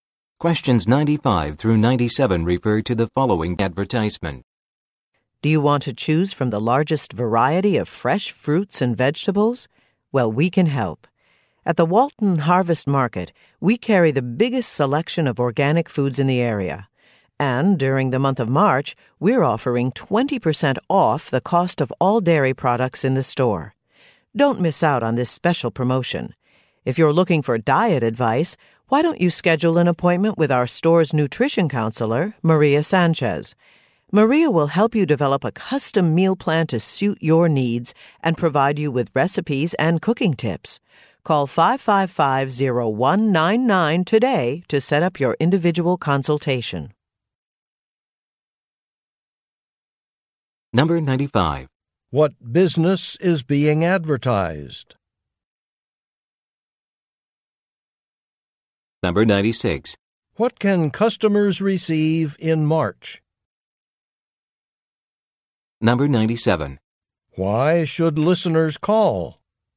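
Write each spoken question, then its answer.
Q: What business is being advertised?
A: A market (grocery store)

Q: What can customers receive in March?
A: 20% off dairy products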